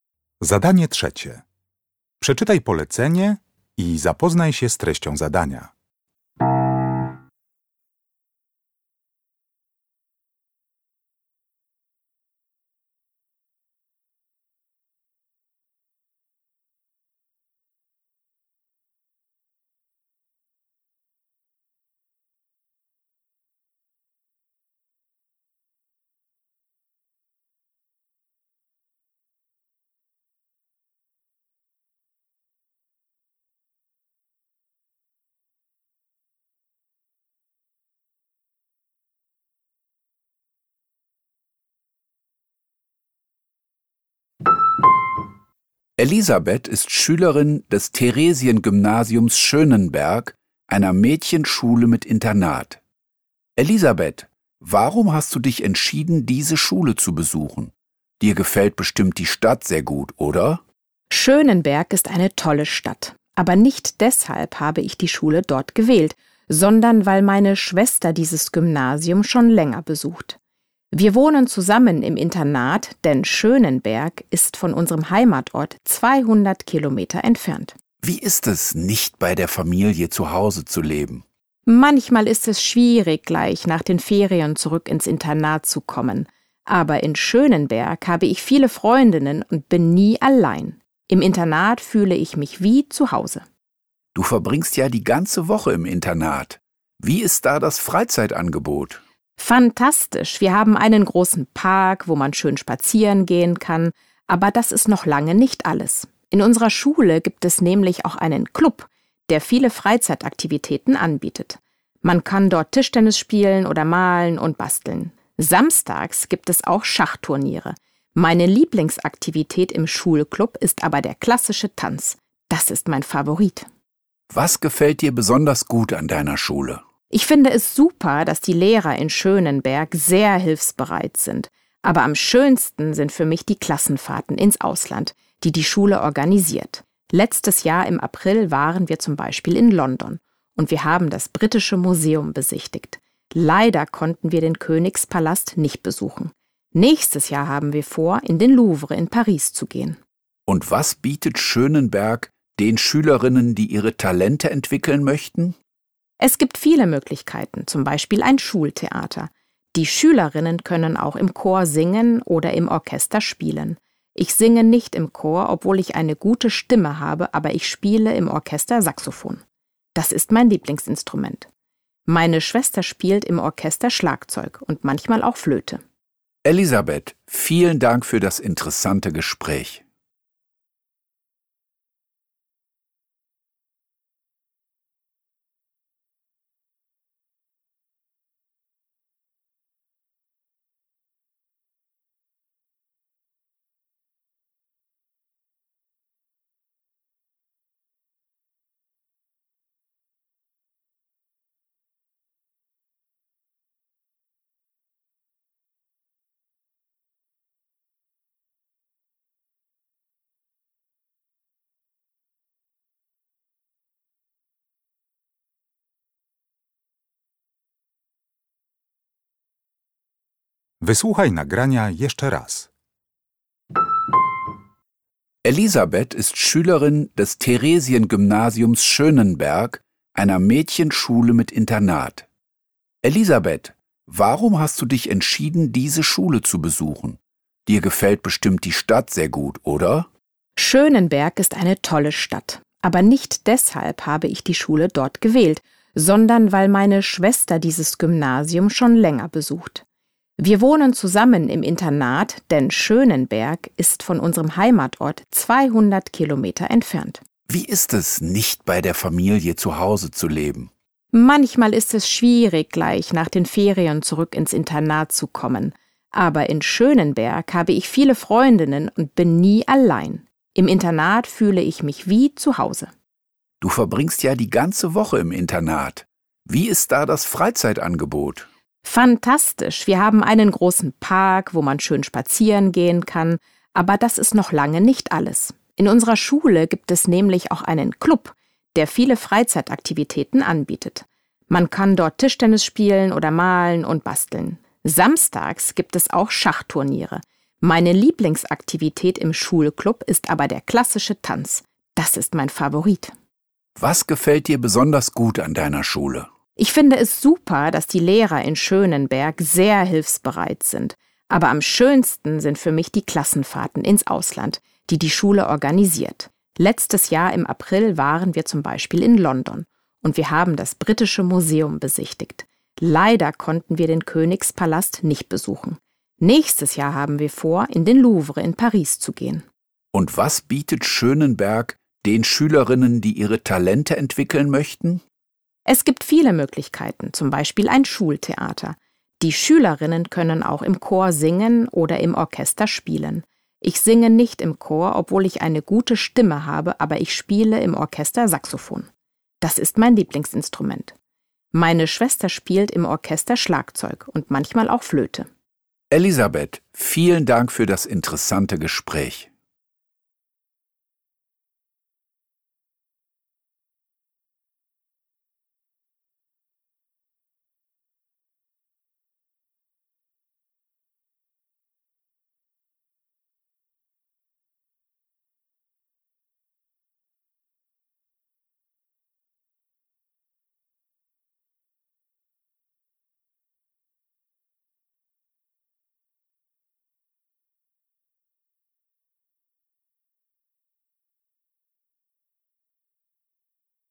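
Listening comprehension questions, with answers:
Uruchamiając odtwarzacz z oryginalnym nagraniem CKE usłyszysz dwukrotnie wywiad dotyczący gimnazjum w Schönenbergu. Na podstawie informacji zawartych w nagraniu uzupełnij luki (3.1.–3.4.) w zdaniach, tak aby jak najbardziej precyzyjnie oddać sens wysłuchanego tekstu. Luki należy uzupełnić w języku niemieckim.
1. Elisabeth hat sich für das Gymnasium in Schönenberg entschieden, weil 3.1. .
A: ihre Schwester dieses Gymnasium schon länger besucht

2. Elisabeths liebste Freizeitbeschäftigung im Schulclub ist 3.2. .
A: der klassische Tanz

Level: Poziom: podstawowy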